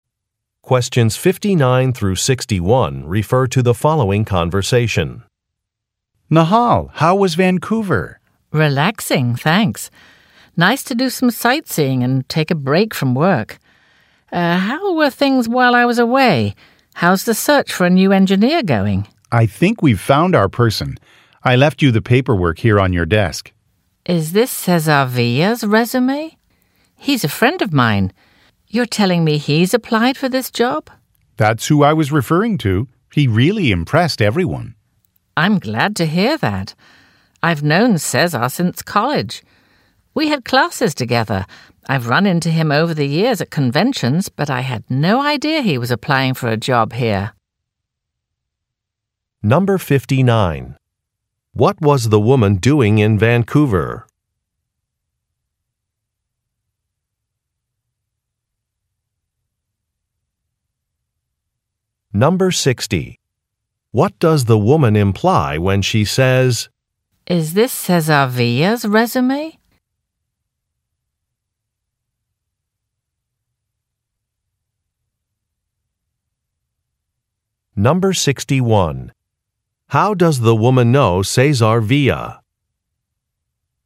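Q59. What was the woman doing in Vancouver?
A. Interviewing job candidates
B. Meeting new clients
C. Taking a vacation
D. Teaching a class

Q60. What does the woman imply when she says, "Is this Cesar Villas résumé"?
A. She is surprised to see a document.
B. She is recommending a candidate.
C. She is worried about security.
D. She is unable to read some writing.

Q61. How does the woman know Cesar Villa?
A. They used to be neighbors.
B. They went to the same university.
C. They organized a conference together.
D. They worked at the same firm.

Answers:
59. C
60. A
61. B

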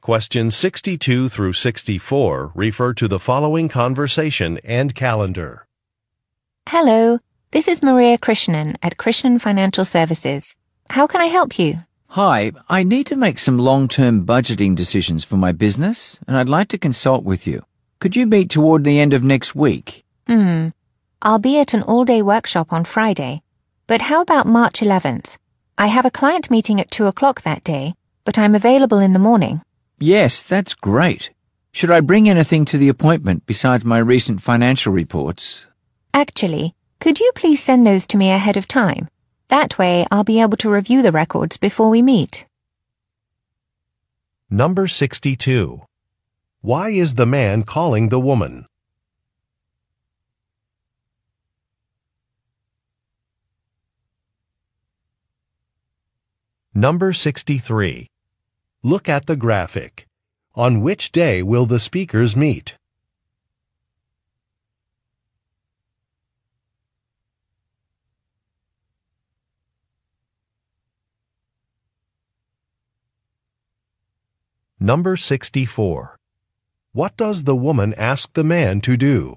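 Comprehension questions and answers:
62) Why is the man calling the woman?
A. To fix a scheduling error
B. To register for a workshop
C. To confirm a lunch reservation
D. To arrange a consultation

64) What does the woman ask the man to do?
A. Arrive early to an appointment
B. Arrange transportation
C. Pay a fee in advance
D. Send some documents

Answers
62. D
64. D

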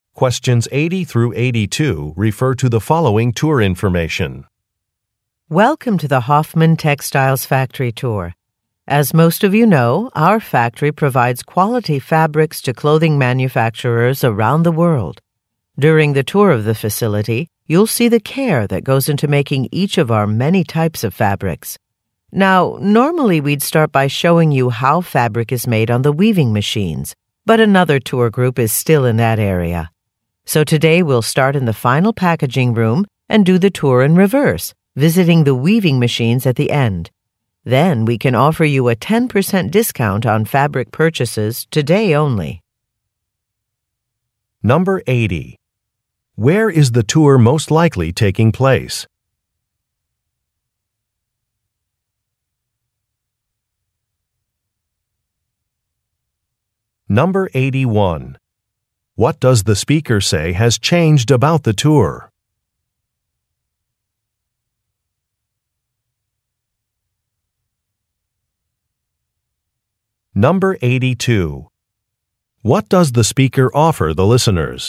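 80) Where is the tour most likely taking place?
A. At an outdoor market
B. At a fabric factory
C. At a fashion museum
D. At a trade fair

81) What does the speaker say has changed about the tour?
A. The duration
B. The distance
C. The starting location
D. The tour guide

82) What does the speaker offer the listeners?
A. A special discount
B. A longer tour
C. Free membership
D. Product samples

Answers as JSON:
{"80": "B", "81": "C", "82": "A"}

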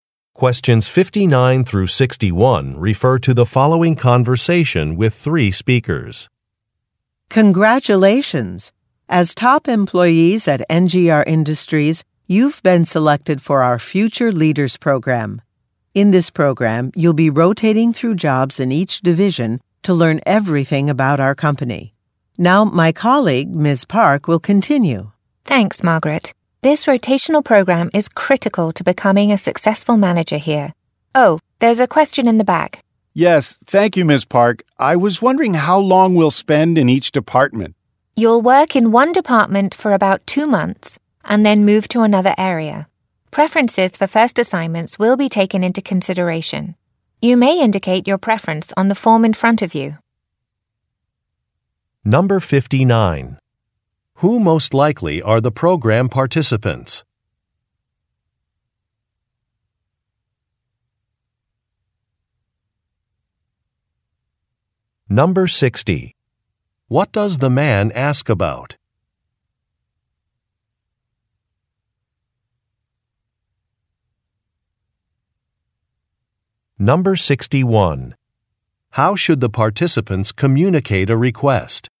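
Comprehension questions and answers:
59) Who most likely are the program participants?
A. Sales recruiters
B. Prospective clients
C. Building inspectors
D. Management trainees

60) What does the man ask about?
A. An office location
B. A budget amount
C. A length of time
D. A list of attendees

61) How should the participants communicate a request?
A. By making a phone call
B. By speaking with Ms. Park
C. By sending an e-mail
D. By filling out a form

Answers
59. D
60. C
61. D

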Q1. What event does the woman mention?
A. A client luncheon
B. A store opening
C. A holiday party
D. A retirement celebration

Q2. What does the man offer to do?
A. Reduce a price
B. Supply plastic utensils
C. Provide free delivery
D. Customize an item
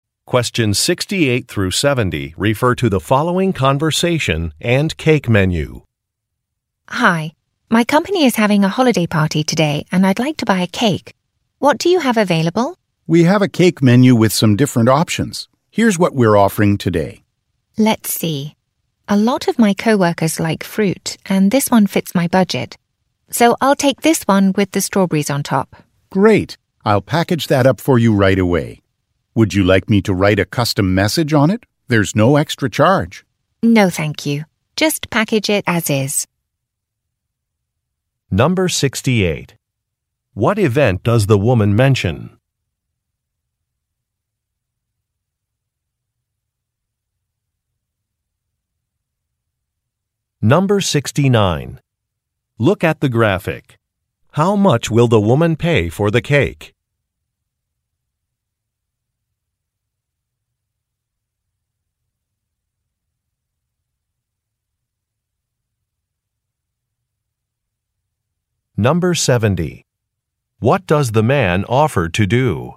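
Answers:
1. C
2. D

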